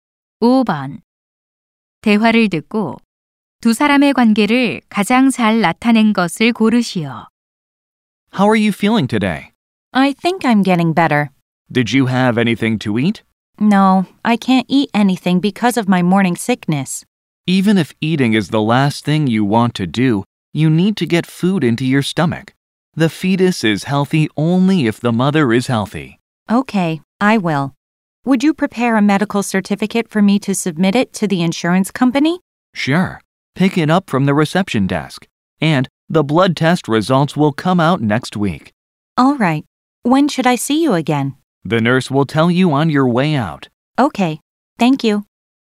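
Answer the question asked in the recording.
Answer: 의사와 임신한 환자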